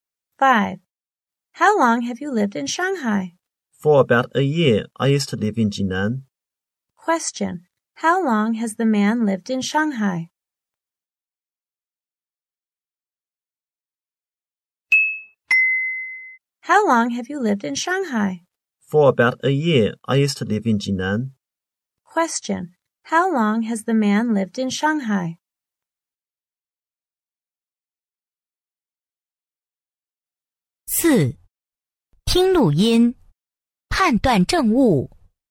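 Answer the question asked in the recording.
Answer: For about a year.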